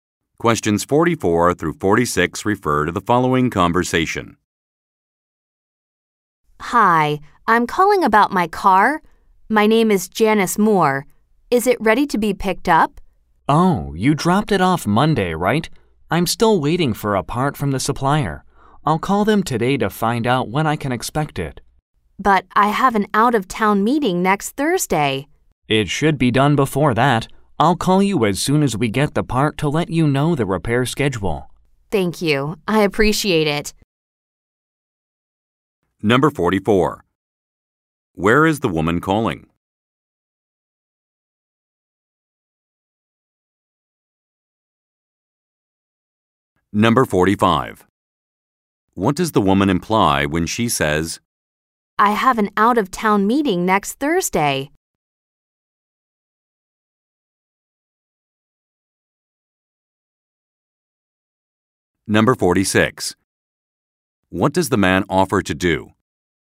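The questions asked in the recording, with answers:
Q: Where is the woman calling?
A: A car repair shop

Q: What does the woman imply when she says,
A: She needs her car back before next Thursday

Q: What does the man offer to do?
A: Call her when the part arrives to tell her the repair schedule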